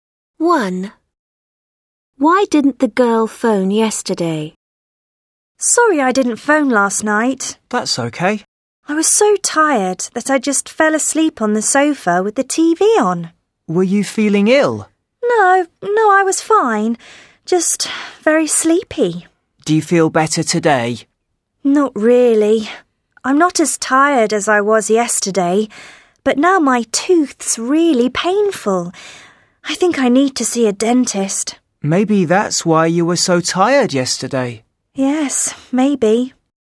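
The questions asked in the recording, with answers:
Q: Why didn't the girl phone yesterday?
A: She was so tired that she fell asleep on the sofa.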